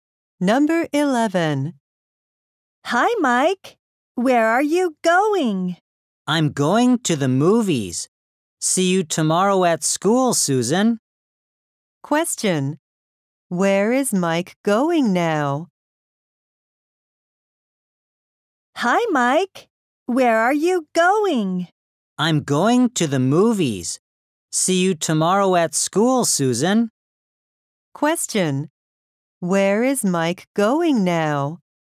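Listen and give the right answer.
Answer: To the movies.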